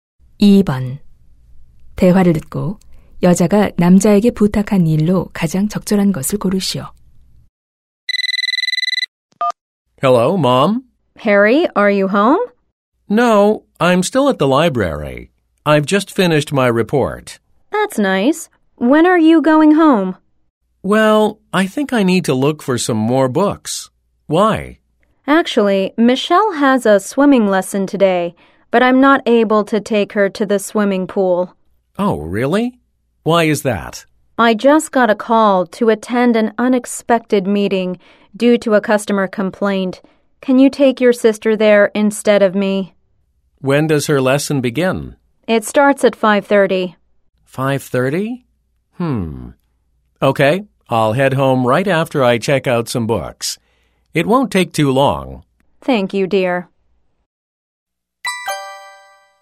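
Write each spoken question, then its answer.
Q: 대화를 듣고 여자가 남자에게 부탁한 일로 가장 적절한 것을 고르시오.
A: 여동생을 수영장에 데려다주기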